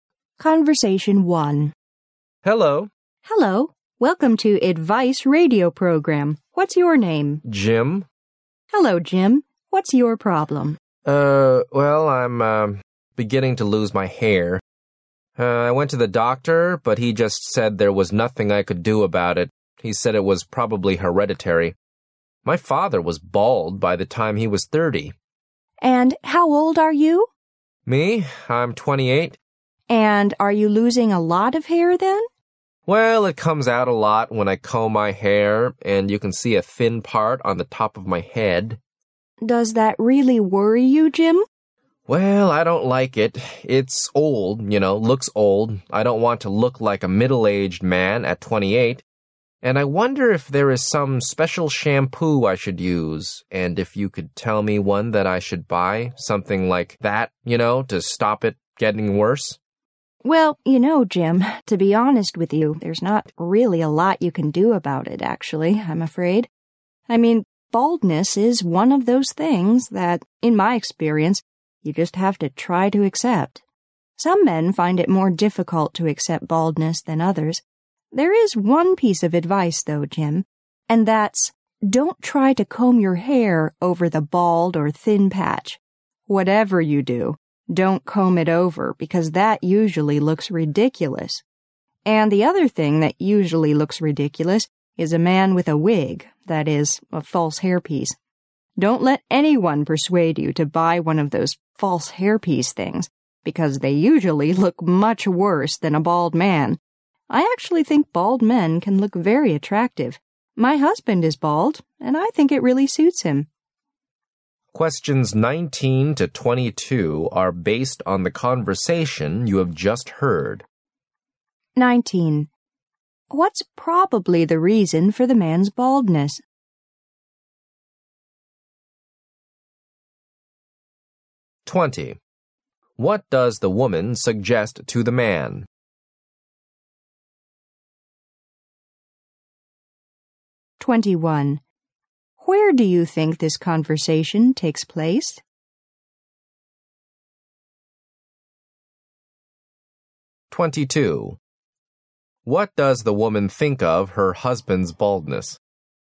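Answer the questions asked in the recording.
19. It's hereditary.
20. Accept it and don't comb hair over the bald patch or wear a wig.
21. On a radio advice program.
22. It suits him; she finds it attractive.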